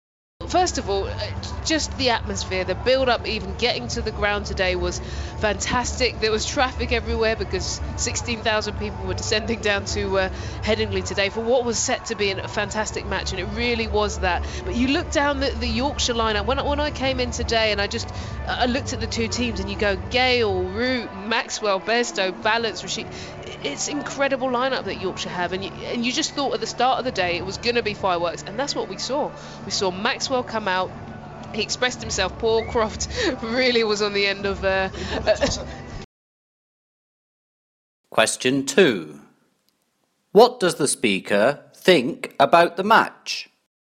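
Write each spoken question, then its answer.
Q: What does the speaker think about the match?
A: It was fantastic, full of fireworks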